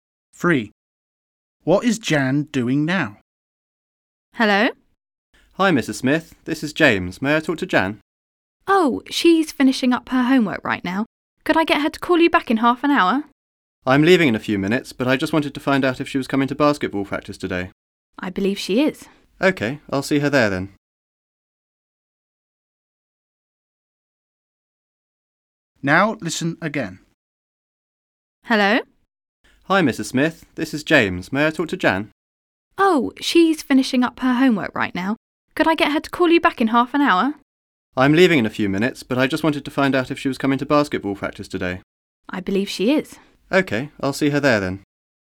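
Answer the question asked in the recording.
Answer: finishing her homework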